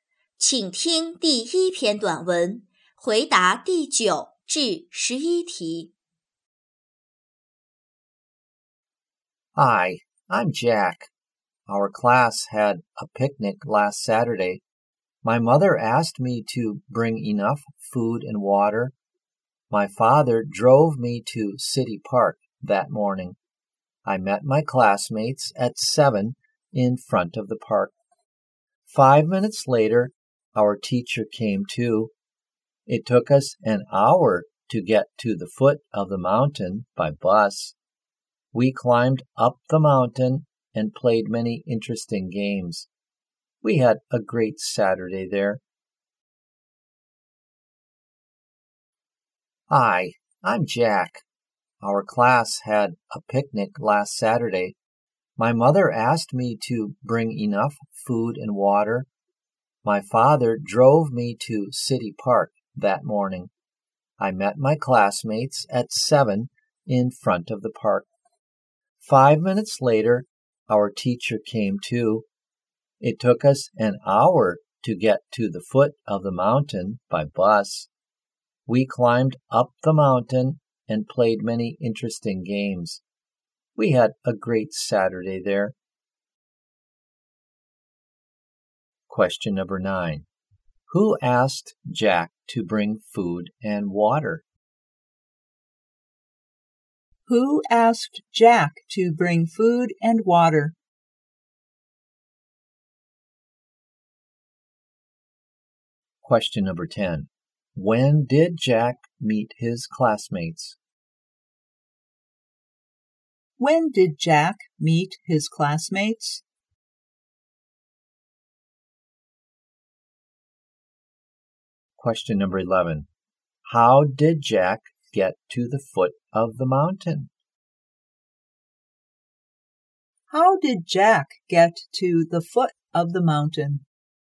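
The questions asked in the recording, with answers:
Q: Who asked Jack to bring food and water?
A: His mother

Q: When did Jack meet his classmates?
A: At 7

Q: How did Jack get to the foot of the mountain?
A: By bus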